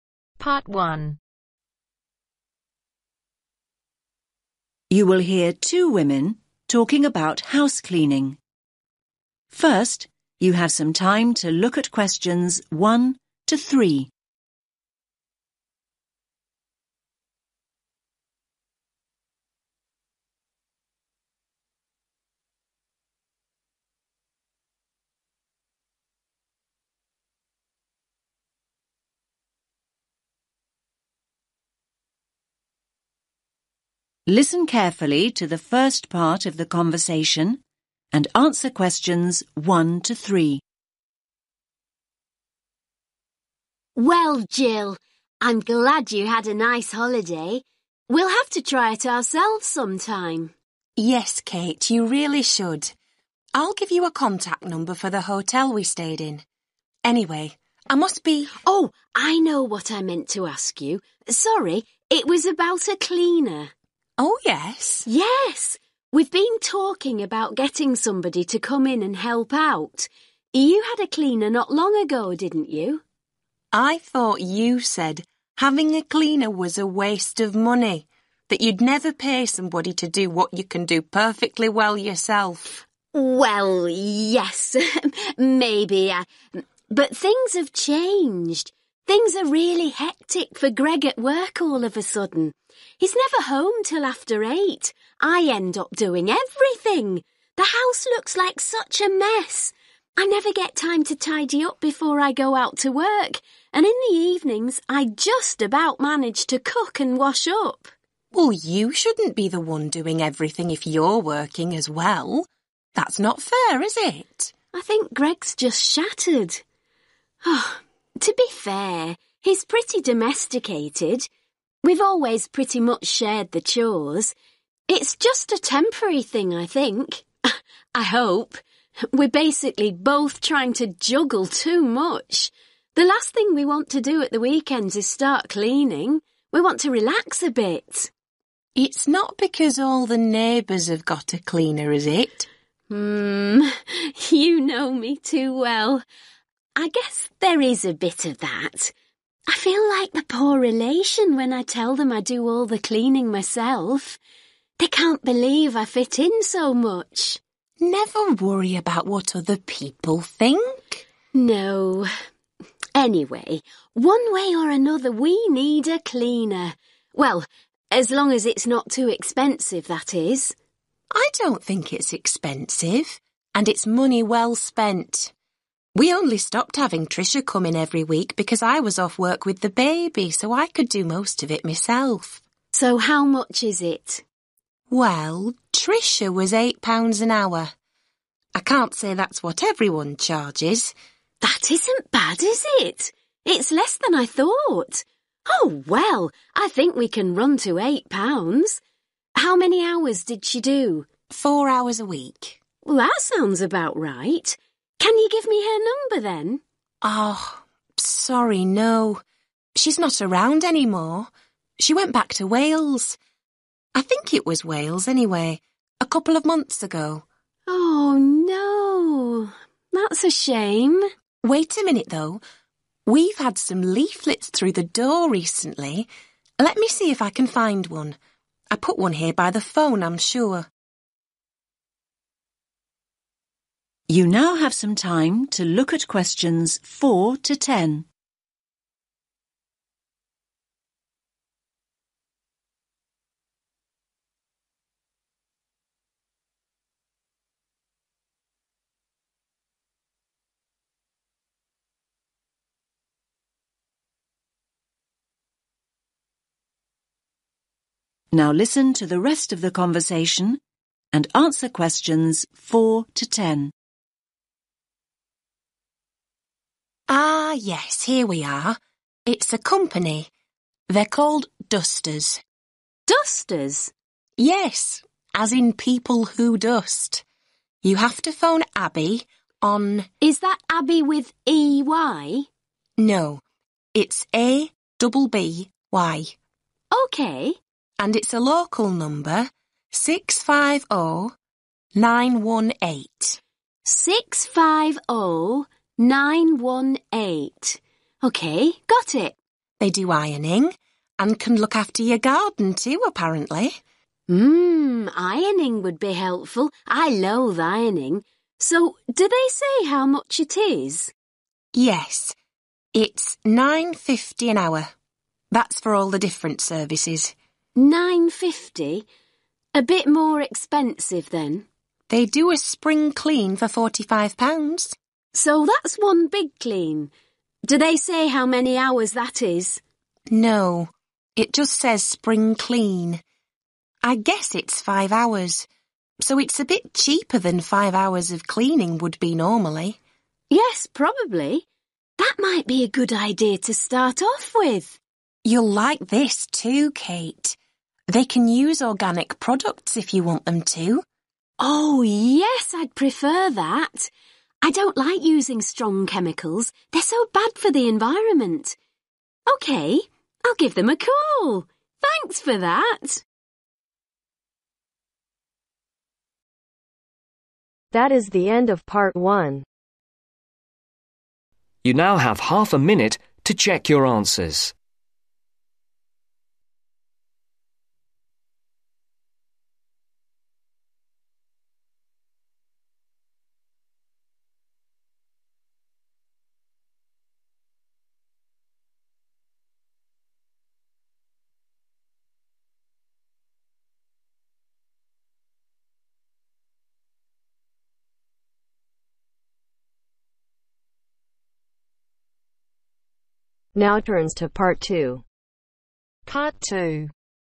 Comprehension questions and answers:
Choose THREE letters A-G.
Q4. (4)............ Reliable home cleaning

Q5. Call (5)............ on 07984 (6)............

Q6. Call (5)............ on 07984 (6)............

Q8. Garden care $(8)............ per hour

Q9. Thorough spring clean $(9)............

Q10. Organic (10)............ available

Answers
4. Dusters
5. Abby
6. 650918
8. 9.50
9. 45
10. Products